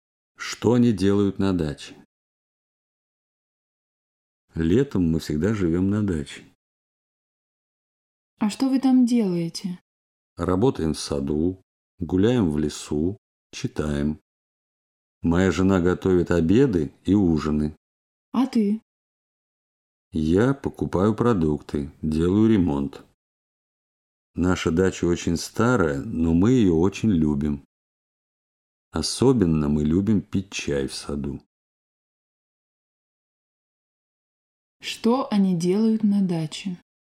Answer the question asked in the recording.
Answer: Они работают в саду, гуляют в лесу, читают, делают ремонт, пьют чай в саду.